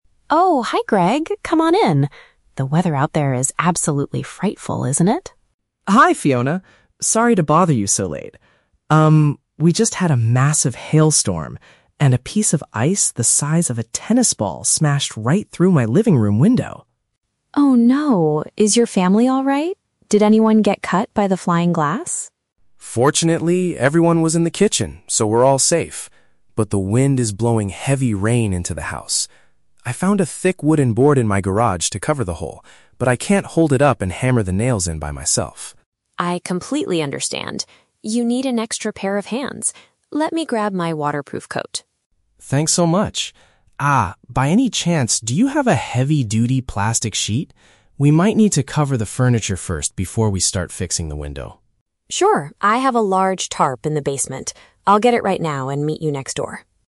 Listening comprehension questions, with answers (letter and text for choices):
Listen to a conversation between two neighbors and choose the correct answer (A, B, or C) for each question.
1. What caused the damage to Greg's house?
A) A strong wind that blew open the front door.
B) An unusually large chunk of frozen rain.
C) A tennis ball that someone threw from the street.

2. Why did Greg come to Fiona's house?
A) To ask for physical assistance to seal the broken glass.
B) To borrow a hammer and some nails to repair his roof.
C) To check if Fiona was injured by the sharp pieces of glass.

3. What does Fiona agree to bring with her?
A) A thick piece of wood from her basement.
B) Her waterproof jacket to give to Greg's family.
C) A large cover to protect the indoor belongings.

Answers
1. B) An unusually large chunk of frozen rain.
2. A) To ask for physical assistance to seal the broken glass.
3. C) A large cover to protect the indoor belongings.

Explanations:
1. Greg says his window was smashed by "a piece of ice" from a "hailstorm". "Frozen rain" is a paraphrase of hail/ice.
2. Greg has a wooden board but says he "can't hold it up and hammer the nails in by myself." Fiona understands he needs "an extra pair of hands" (physical assistance) to seal the window.

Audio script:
Fiona: Oh, hi Greg. Come on in. The weather out there is absolutely frightful, isn't it?
Greg: Hi Fiona. Sorry to bother you so late. Um, we just had a massive hailstorm, and a piece of ice the size of a tennis ball smashed right through my living room window.
Fiona: Oh no! Is your family alright? Did anyone get cut by the flying glass?
Greg: Fortunately, everyone was in the kitchen, so we're all safe. But the wind is blowing heavy rain into the house. I found a thick wooden board in my garage to cover the hole, but I can't hold it up and hammer the nails in by myself.
Fiona: I completely understand. You need an extra pair of hands. Let me grab my waterproof coat.
Greg: Thanks so much. Ah, by any chance, do you have a heavy-duty plastic sheet? We might need to cover the furniture first before we start fixing the window.